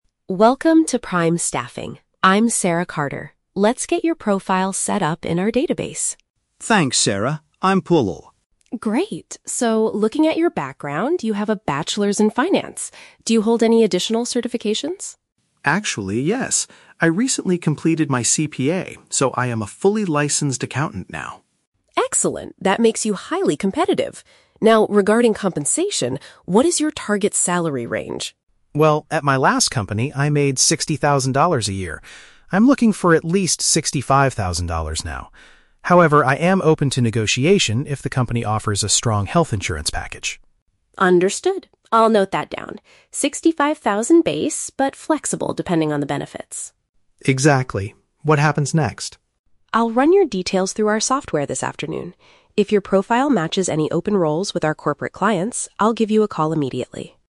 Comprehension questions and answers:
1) What is Paul's current professional status?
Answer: He has officially obtained a formal professional license.

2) What is Paul's attitude towards his expected salary?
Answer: He is willing to accept less money if the company perks are good.

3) What will Ms. Carter do later today?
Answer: Search the agency's database for positions that fit his qualifications.

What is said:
Carter: Welcome to Prime Staffing. I'm Sarah Carter. Let's get your profile set up in our database.
Paul: Thanks, Sarah. I'm Paul.
Carter: Great. So, looking at your background, you have a Bachelor's in Finance. Do you hold any additional certifications?
Paul: Actually, yes. I recently completed my CPA, so I am a fully licensed accountant now.
Carter: Excellent, that makes you highly competitive. Now, regarding compensation, what is your target salary range?
Paul: Well, at my last company I made sixty thousand a year. I'm looking for at least sixty-five thousand now. However, I am open to negotiation if the company offers a strong health insurance package.
Carter: Understood. I'll note that down: sixty-five thousand base, but flexible depending on the benefits.
Paul: Exactly. What happens next?
Carter: I'll run your details through our software this afternoon.